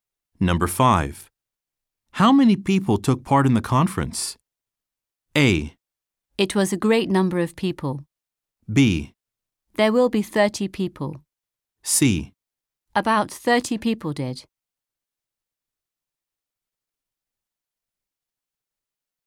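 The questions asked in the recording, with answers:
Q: How many people took part in the conference?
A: C: About 30 people did.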